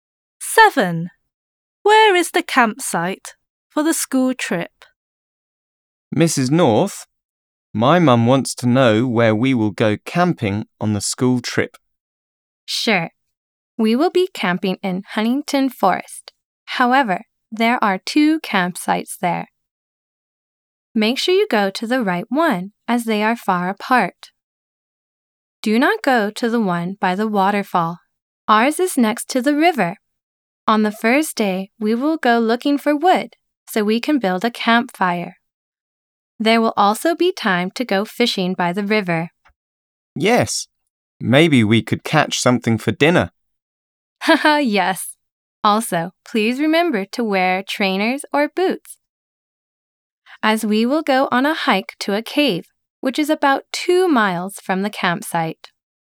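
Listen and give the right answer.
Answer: Next to the river in Huntington Forest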